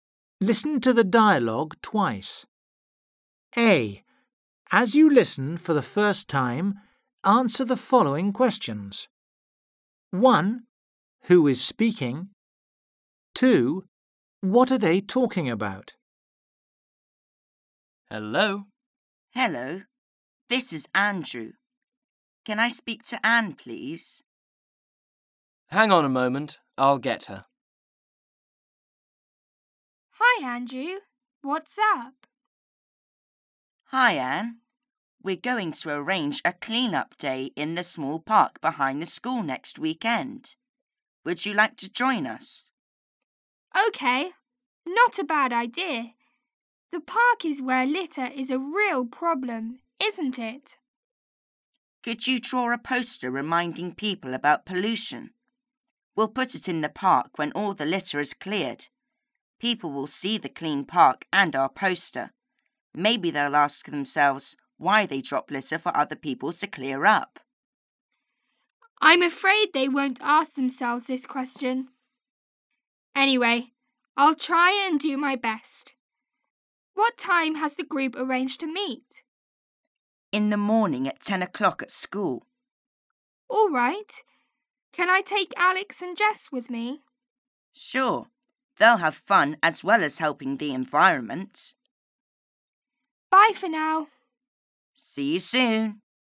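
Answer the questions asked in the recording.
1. Andrew and Anne
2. A clean-up day in the park behind the school next weekend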